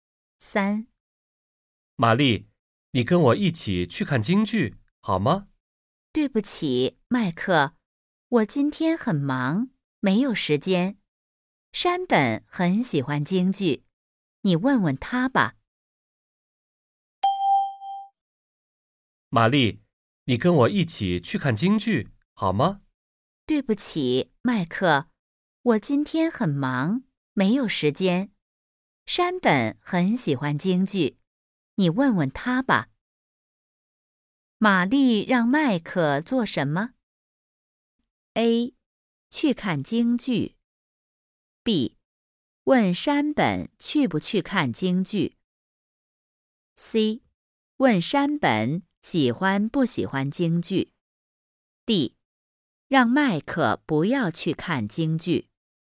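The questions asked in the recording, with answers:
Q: 玛丽让麦克做什么?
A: B: 问山本去不去看京剧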